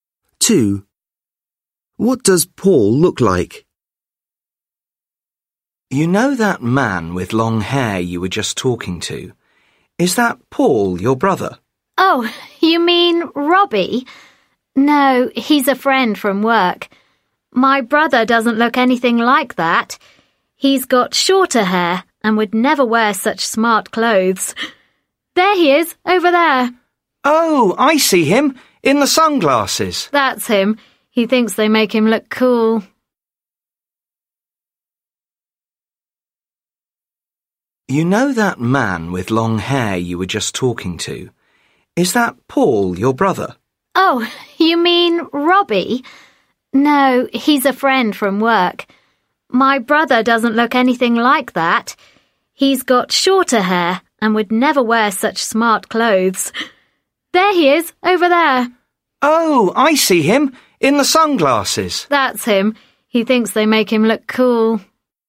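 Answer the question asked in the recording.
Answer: Short hair, wears sunglasses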